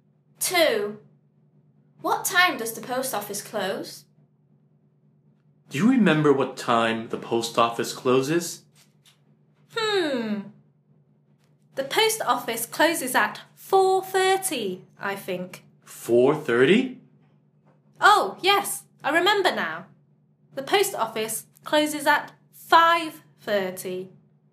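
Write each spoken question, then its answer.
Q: What time does the post office close?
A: 5:30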